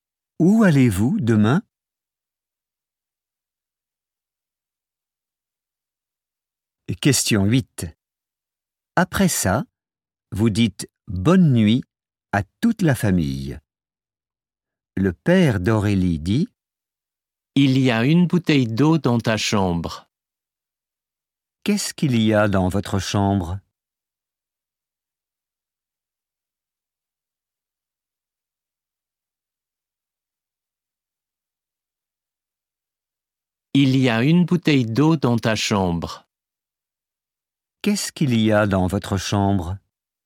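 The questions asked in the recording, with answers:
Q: Qu'est-ce qu'il y a dans votre chambre?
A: Une bouteille d'eau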